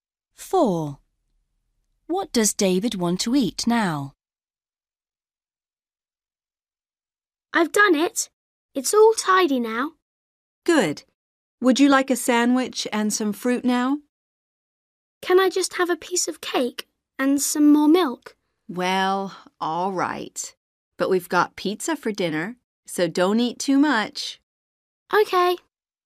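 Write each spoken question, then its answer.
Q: What does David want to eat now?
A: a piece of cake (and some milk)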